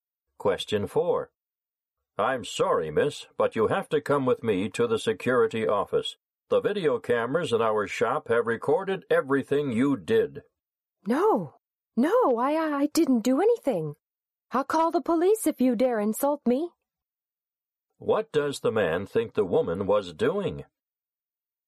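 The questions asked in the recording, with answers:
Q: What does the man think the woman was doing?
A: Stealing from the shop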